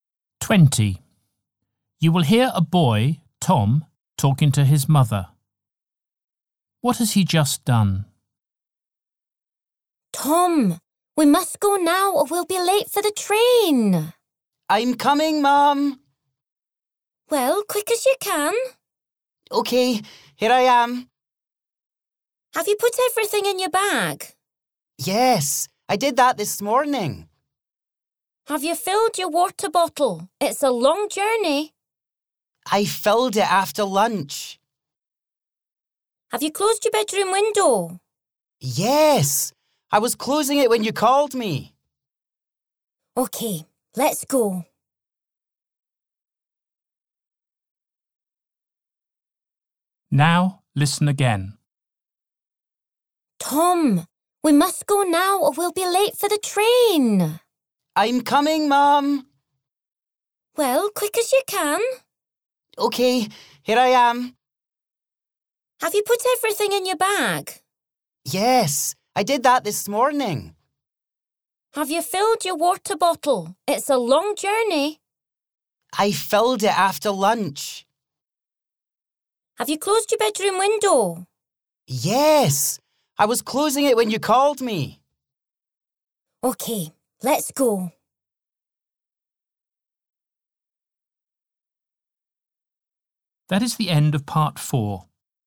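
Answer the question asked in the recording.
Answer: closed his bedroom window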